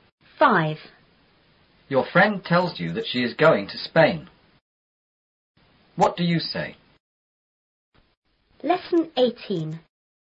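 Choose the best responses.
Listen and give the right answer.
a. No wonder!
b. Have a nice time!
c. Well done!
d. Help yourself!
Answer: b. Have a nice time!

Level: 初中英语广州版4B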